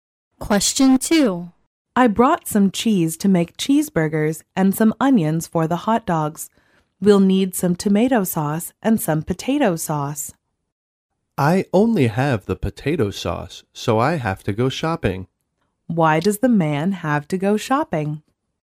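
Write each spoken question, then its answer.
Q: Why does the man have to go shopping?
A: To buy tomato sauce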